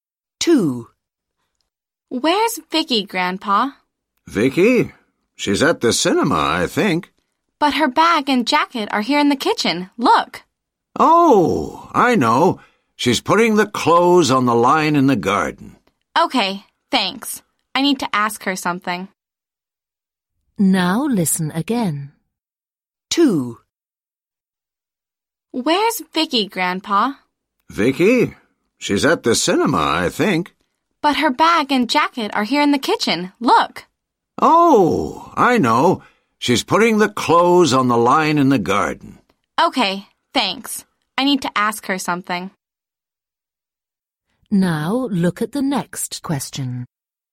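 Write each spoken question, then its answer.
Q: Where's Vicky, Grandpa?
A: In the garden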